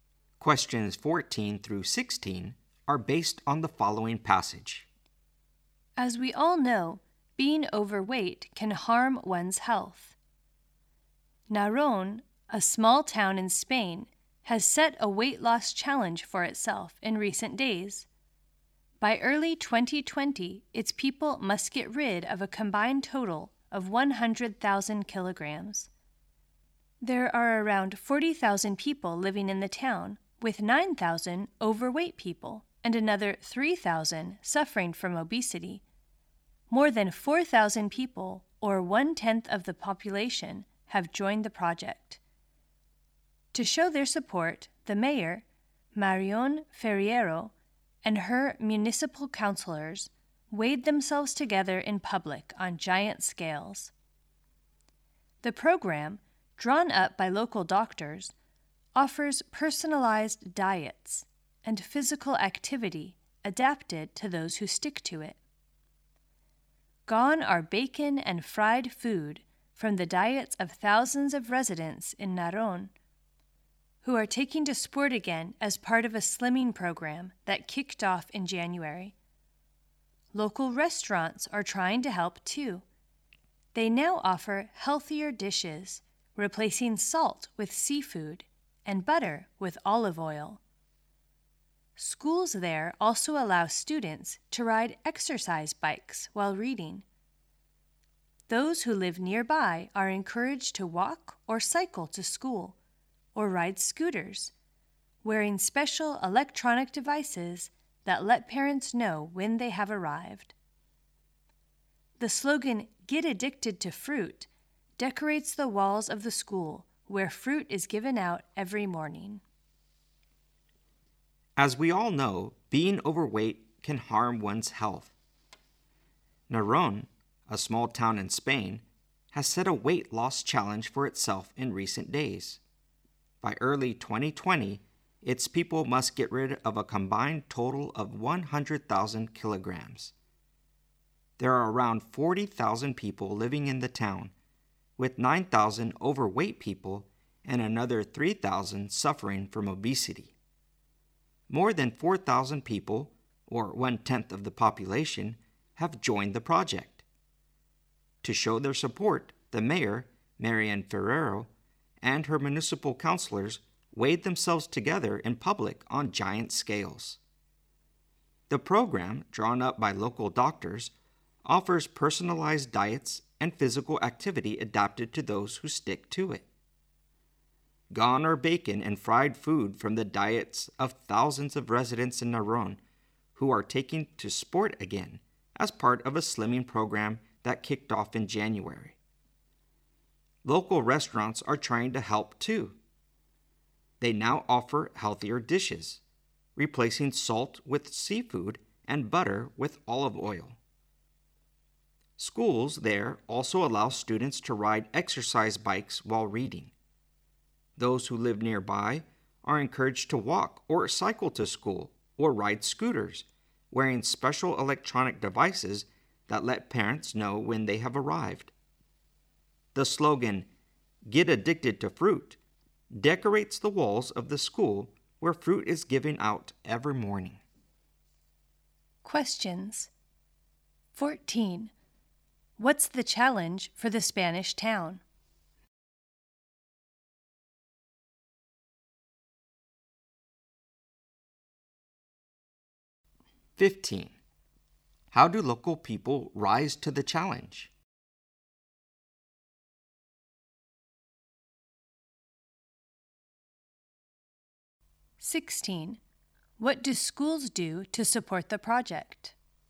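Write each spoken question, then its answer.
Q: What's the challenge for the Spanish town?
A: To lose a combined total of 100,000 kilograms by early 2020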